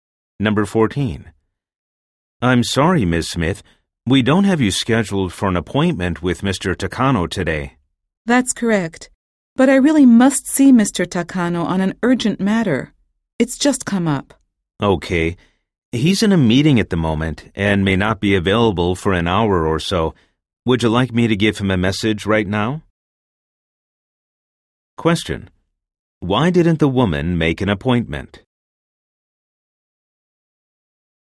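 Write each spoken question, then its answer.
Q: Why didn't the woman make an appointment?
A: An urgent matter had just come up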